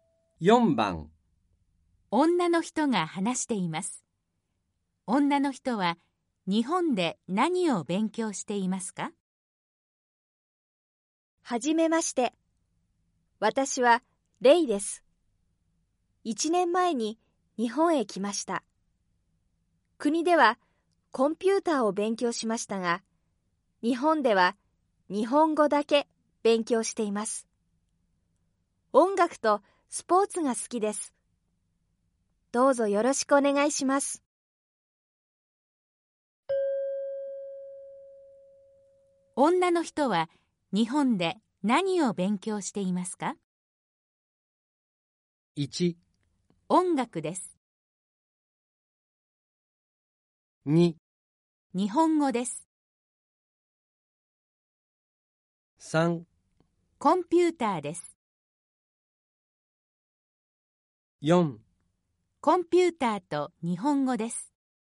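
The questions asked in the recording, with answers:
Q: 女の人は日本で何を勉強していますか?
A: 2: 日本語です。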